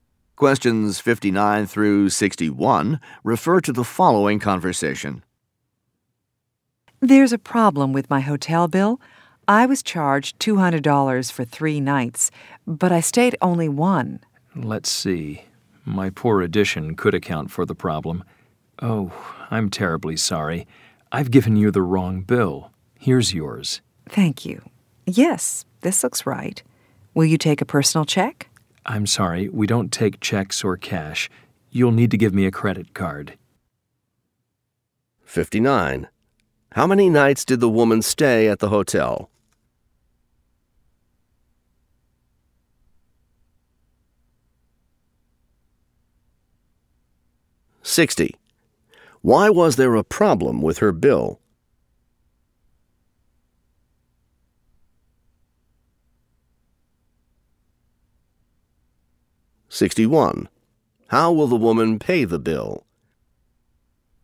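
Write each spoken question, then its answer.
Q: How many nights did the woman stay at the hotel?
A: One

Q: Why was there a problem with her bill?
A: She was given the wrong bill

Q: How will the woman pay the bill?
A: By credit card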